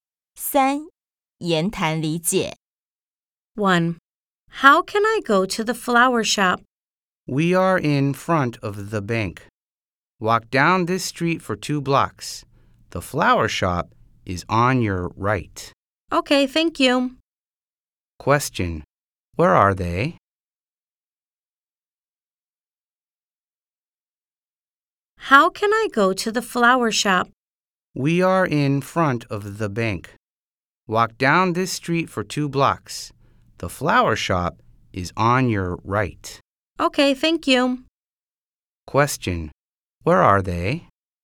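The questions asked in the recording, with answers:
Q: Where are they?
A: In front of the bank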